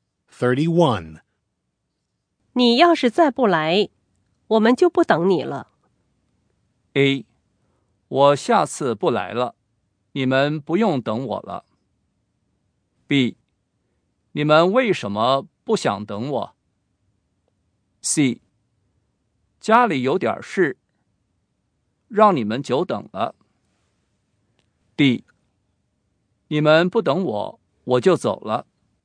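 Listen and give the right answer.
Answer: C: 家里有点事,让你们久等了。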